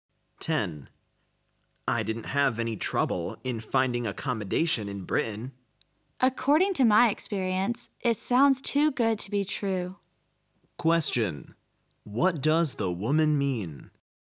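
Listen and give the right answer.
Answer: She doesn't believe it; finding accommodation in Britain is hard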